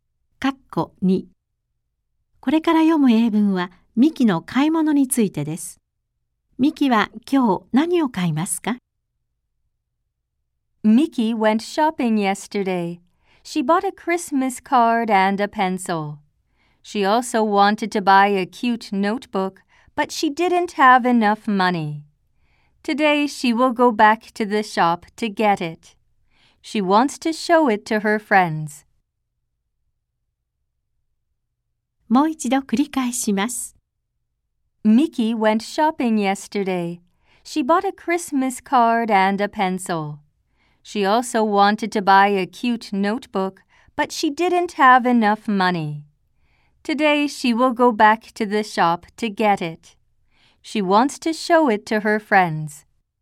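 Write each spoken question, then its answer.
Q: Miki は今日何を買いますか?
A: かわいいノート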